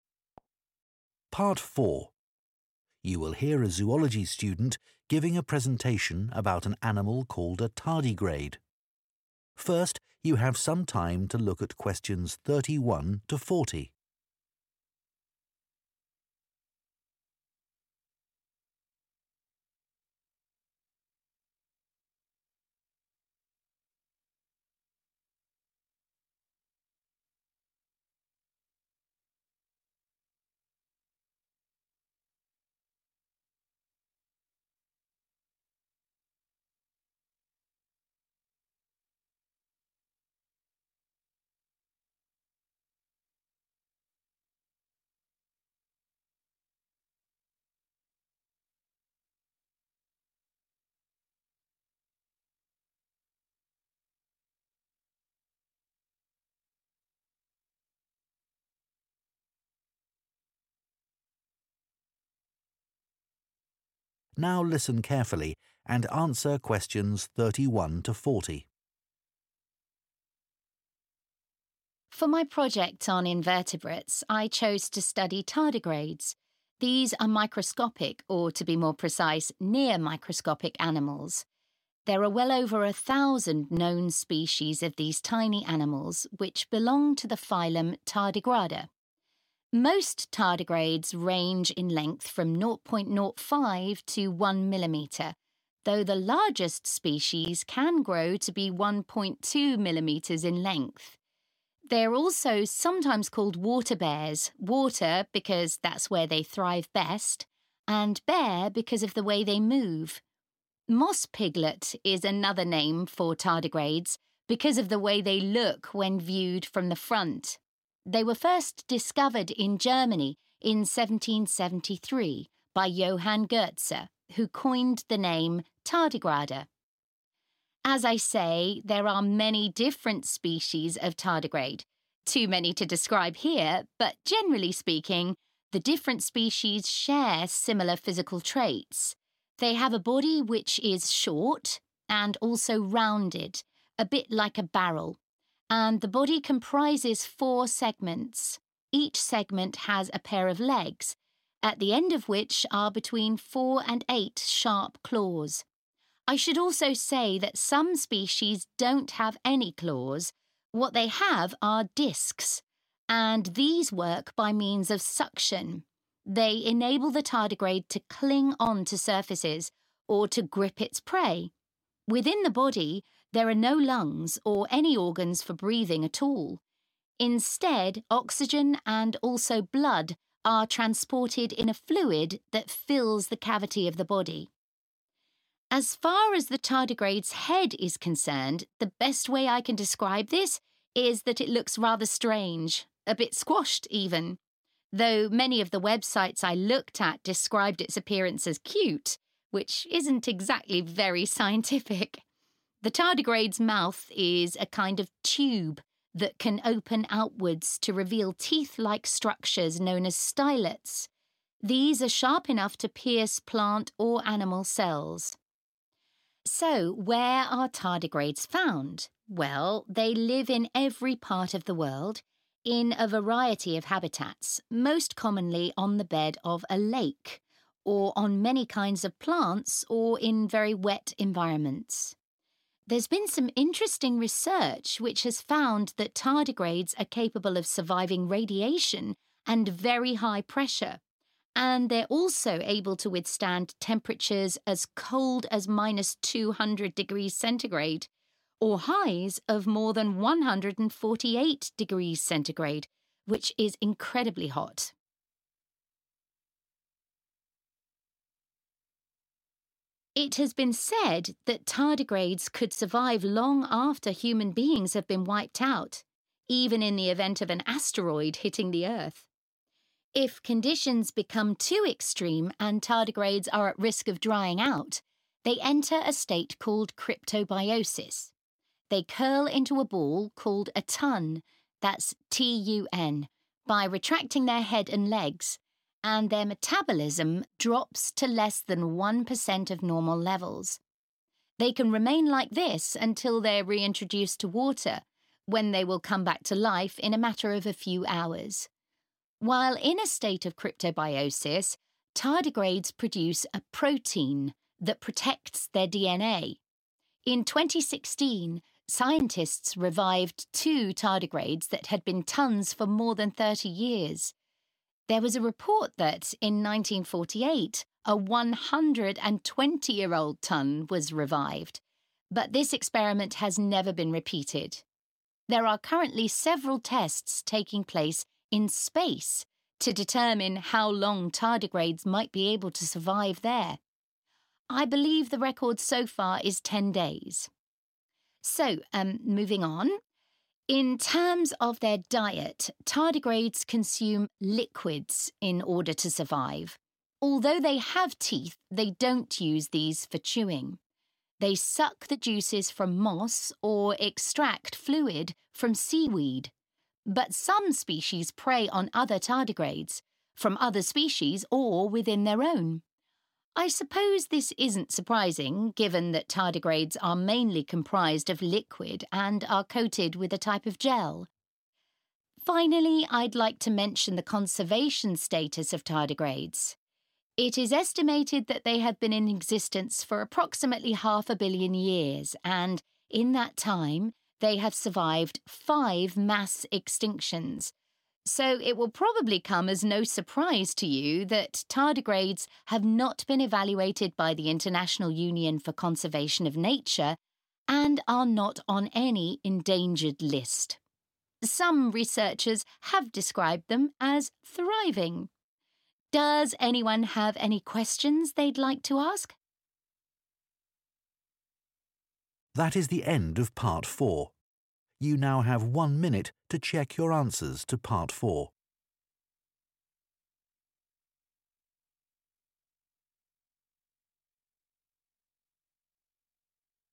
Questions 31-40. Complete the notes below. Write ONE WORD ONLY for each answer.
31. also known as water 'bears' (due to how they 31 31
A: move

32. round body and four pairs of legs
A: short

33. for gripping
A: discs

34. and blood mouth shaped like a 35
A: oxygen

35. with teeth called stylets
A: tube

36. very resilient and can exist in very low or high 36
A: temperatures

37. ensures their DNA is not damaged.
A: protein